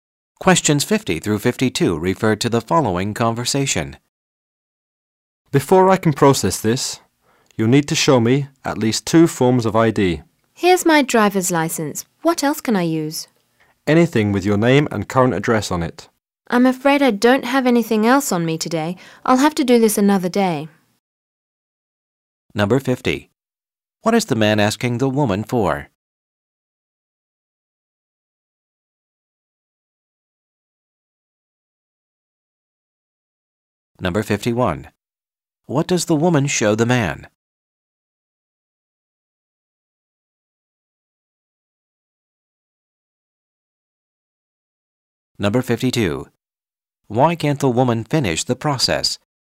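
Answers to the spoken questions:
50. Two forms of ID
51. Her driver's license
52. She doesn't have a second form of ID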